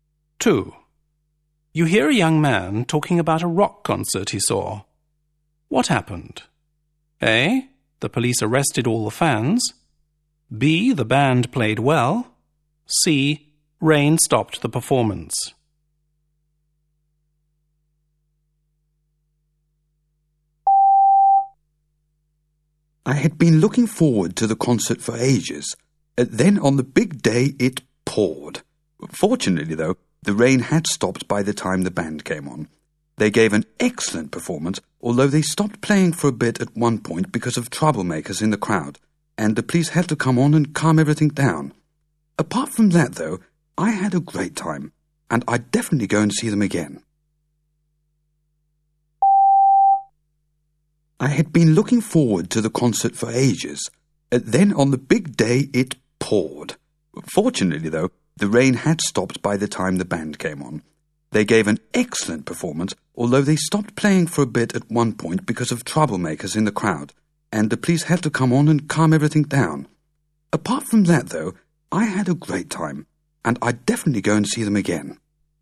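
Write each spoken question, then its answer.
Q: What happened?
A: B: The band played well.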